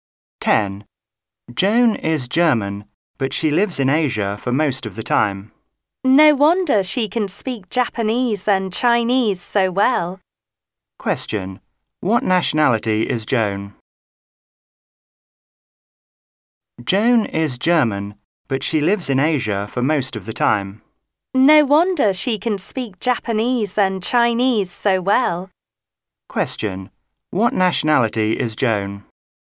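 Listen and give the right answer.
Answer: German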